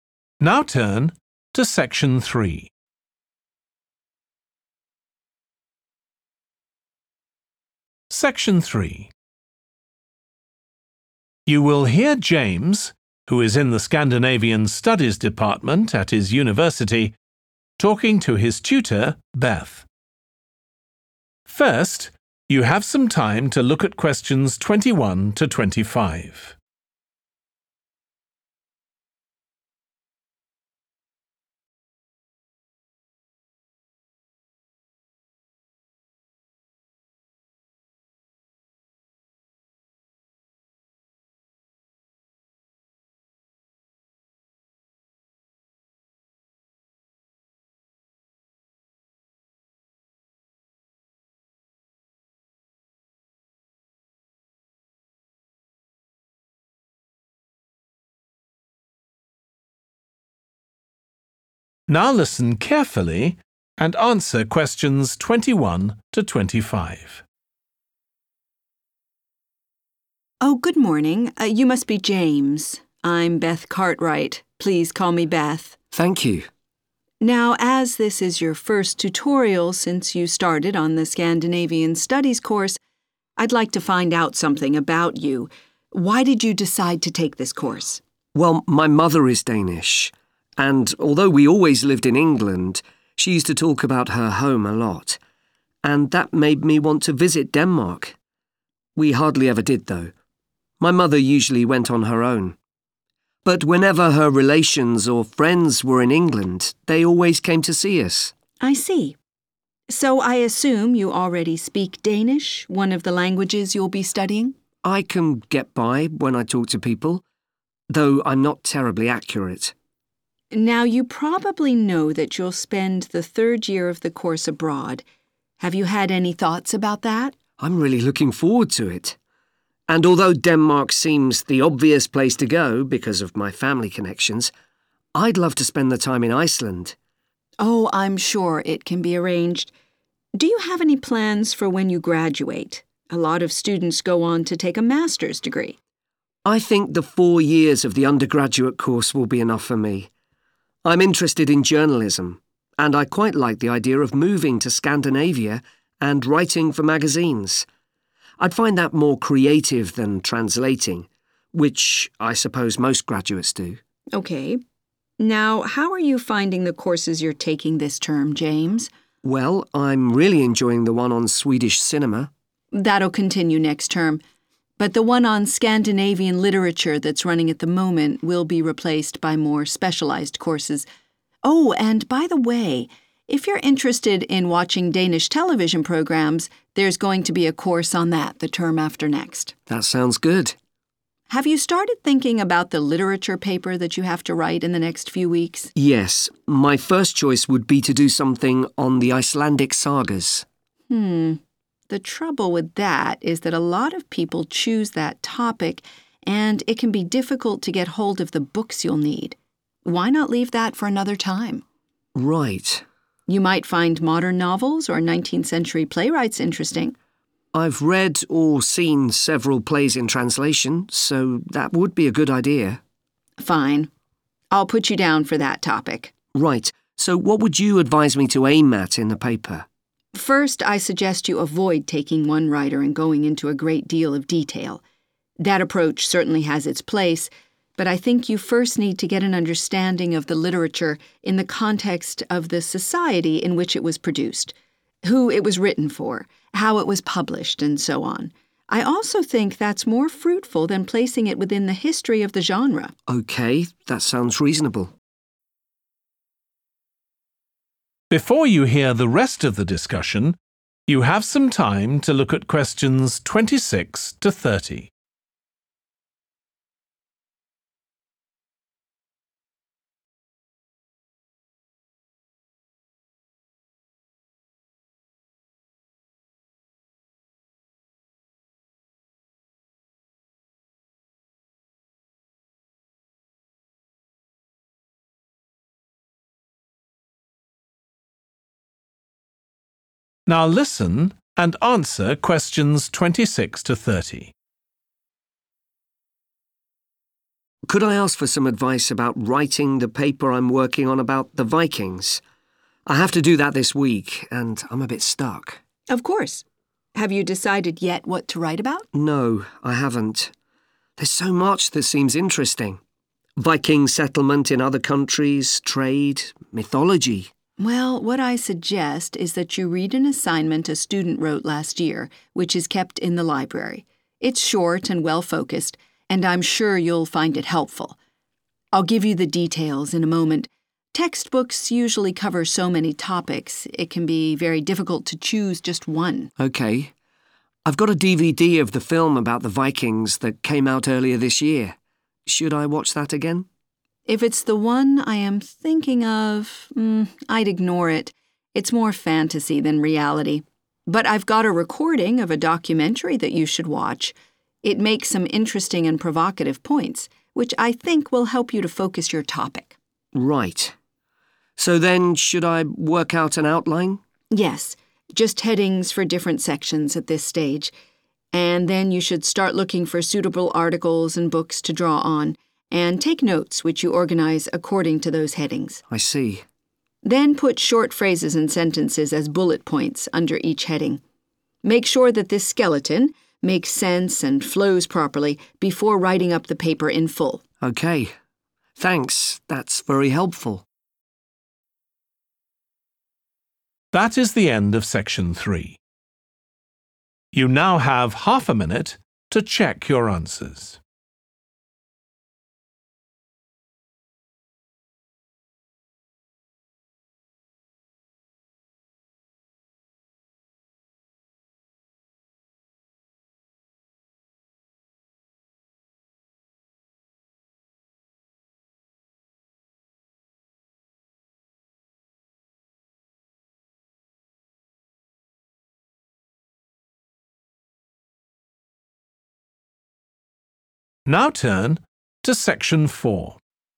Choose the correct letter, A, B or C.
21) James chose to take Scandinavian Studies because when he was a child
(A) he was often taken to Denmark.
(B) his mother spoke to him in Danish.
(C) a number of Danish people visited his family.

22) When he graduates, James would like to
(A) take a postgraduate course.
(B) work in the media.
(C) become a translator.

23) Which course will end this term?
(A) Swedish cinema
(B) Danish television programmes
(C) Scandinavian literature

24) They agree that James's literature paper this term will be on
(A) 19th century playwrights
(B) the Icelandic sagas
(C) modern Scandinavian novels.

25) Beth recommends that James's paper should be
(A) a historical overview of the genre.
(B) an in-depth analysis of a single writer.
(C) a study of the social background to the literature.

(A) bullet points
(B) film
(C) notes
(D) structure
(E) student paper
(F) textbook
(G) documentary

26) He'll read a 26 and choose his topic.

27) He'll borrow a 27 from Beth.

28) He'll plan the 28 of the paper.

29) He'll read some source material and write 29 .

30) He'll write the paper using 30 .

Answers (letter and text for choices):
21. (C) a number of Danish people visited his family.
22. (B) work in the media.
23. (C) Scandinavian literature
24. (A) 19th century playwrights
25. (C) a study of the social background to the literature.
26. (E) student paper
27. (G) documentary
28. (D) structure
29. (C) notes
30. (A) bullet points